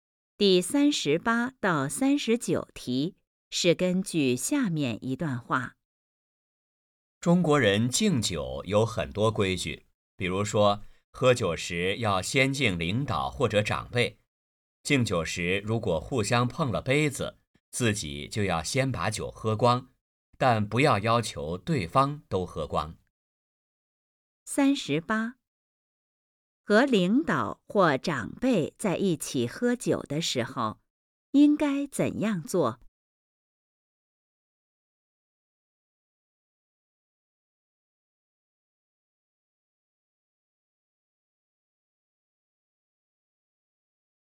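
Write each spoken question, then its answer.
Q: 和领导或长辈在一起喝酒的时候,应该怎样做?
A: 先敬领导或长辈

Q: 这段话主要在讲什么?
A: 中国人敬酒的规矩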